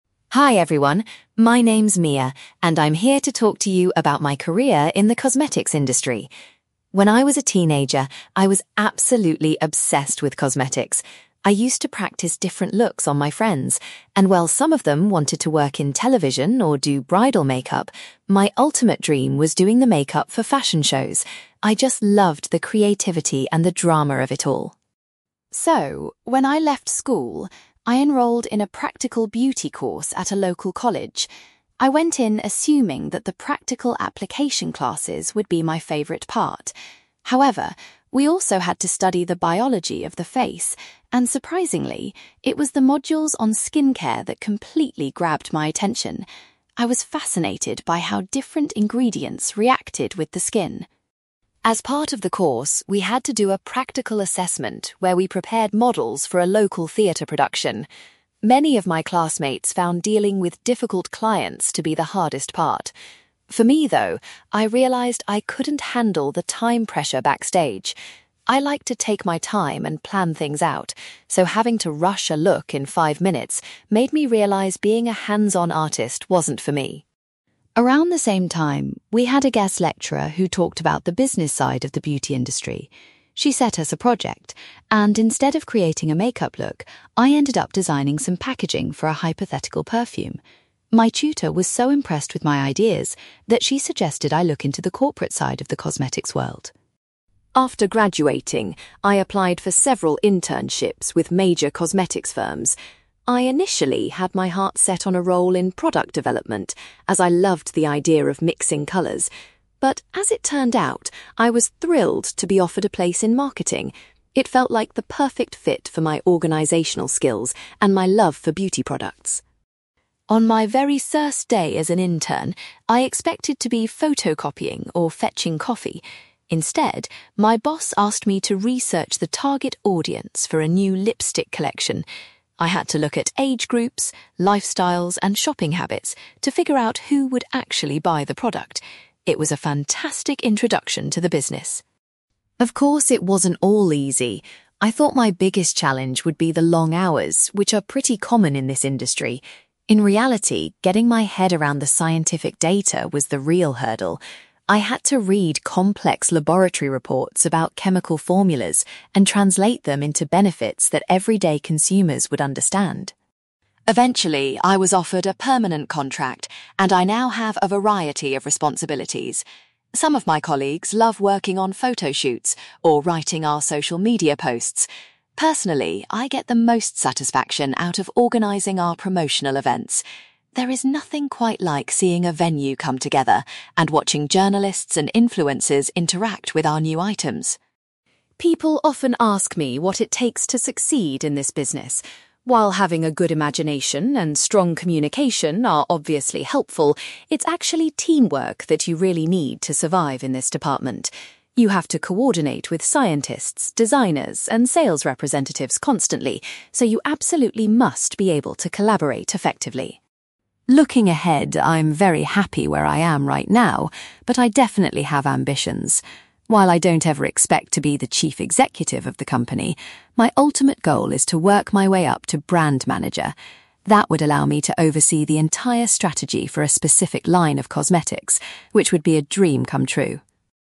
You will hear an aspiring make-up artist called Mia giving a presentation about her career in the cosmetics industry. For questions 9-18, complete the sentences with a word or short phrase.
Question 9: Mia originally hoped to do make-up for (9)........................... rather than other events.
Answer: fashion shows

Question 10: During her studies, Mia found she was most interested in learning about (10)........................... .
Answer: skincare

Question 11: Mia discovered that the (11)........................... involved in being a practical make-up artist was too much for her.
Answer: time pressure

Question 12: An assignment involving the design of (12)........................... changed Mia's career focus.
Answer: packaging

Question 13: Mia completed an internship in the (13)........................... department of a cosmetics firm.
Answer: marketing

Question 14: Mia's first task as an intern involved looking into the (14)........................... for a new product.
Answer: target audience

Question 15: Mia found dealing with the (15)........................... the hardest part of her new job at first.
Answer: scientific data

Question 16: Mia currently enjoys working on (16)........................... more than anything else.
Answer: promotional events

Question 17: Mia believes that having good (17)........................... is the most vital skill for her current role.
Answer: teamwork

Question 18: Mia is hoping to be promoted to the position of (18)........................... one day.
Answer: brand manager

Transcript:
Mia: Hi everyone, my name is Mia, and I'm here to talk to you about my career in the cosmetics industry. When I was a teenager, I was absolutely obsessed with cosmetics. I used to practice different looks on my friends, and while some of them wanted to work in television or do bridal make-up, my ultimate dream was doing the make-up for fashion shows. I just loved the creativity and the drama of it all.
So, when I left school, I enrolled in a practical beauty course at a local college. I went in assuming that the practical application classes would be my favorite part. However, we also had to study the biology of the face, and surprisingly, it was the modules on skincare that completely grabbed my attention. I was fascinated by how different ingredients reacted with the skin.
As part of the course, we had to do a practical assessment where we prepared models for a local theater production. Many of my classmates found dealing with difficult clients to be the hardest part. For me, though, I realized I couldn't handle the time pressure backstage. I like to take my time and plan things out, so having to rush a look in five minutes made me realize being a hands-on artist wasn't for me.
Around the same time, we had a guest lecturer who talked about the business side of the beauty industry. She set us a project, and instead of creating a make-up look, I ended up designing some packaging for a hypothetical perfume. My tutor was so impressed with my ideas that she suggested I look into the corporate side of the cosmetics world.
After graduating, I applied for several internships with major cosmetics firms. I initially had my heart set on a role in product development, as I loved the idea of mixing colors. But, as it turned out, I was thrilled to be offered a place in marketing. It felt like the perfect fit for my organizational skills and my love for beauty products.
On my very first day as an intern, I expected to be photocopying or fetching coffee. Instead, my boss asked me to research the target audience for a new lipstick collection. I had to look at age groups, lifestyles, and shopping habits to figure out who would actually buy the product. It was a fantastic introduction to the business.
Of course, it wasn't all easy. I thought my biggest challenge would be the long hours, which are pretty common in this industry. In reality, getting my head around the scientific data was the real hurdle. I had to read complex laboratory reports about chemical formulas and translate them into benefits that everyday consumers would understand.
Eventually, I was offered a permanent contract, and I now have a variety of responsibilities. Some of my colleagues love working on photo shoots or writing our social media posts. Personally, I get the most satisfaction out of organizing our promotional events. There is nothing quite like seeing a venue come together and watching journalists and influencers interact with our new items.
People often ask me what it takes to succeed in this business. While having a good imagination and strong communication are obviously helpful, it's actually teamwork that you really need to survive in this department. You have to coordinate with scientists, designers, and sales representatives constantly, so you absolutely must be able to collaborate effectively.
Looking ahead, I'm very happy where I am right now, but I definitely have ambitions. While I don't ever expect to be the chief executive of the company, my ultimate goal is to work my way up to brand manager. That would allow me to oversee the entire strategy for a specific line of cosmetics, which would be a dream come true.

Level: B2